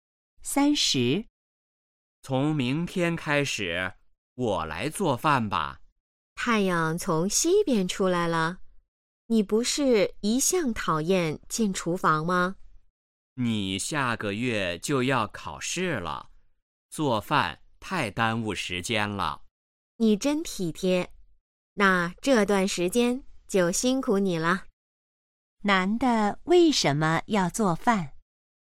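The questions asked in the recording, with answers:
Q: 男的为什么要做饭?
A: 女的下个月要考试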